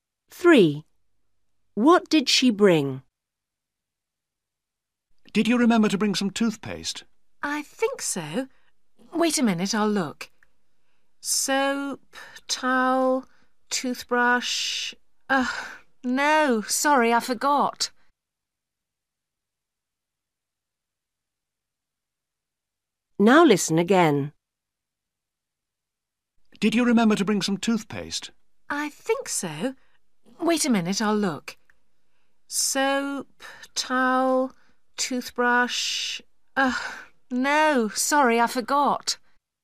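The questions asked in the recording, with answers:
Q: What did she bring?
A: Soap, towel and toothbrush (no toothpaste)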